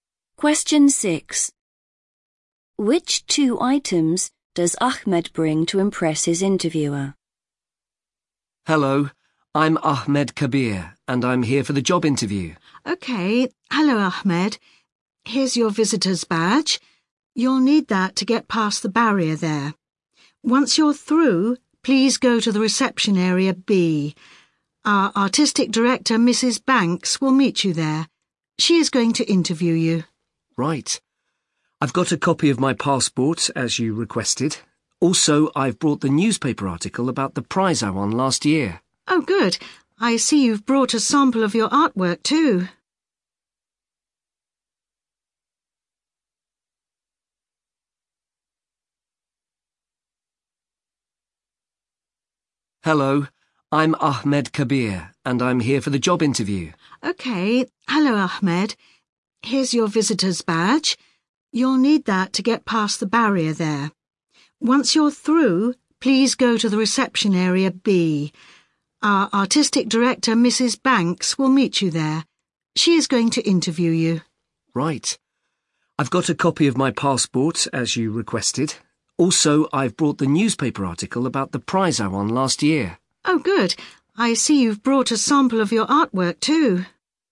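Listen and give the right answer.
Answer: a newspaper article about his prize and a sample of his artwork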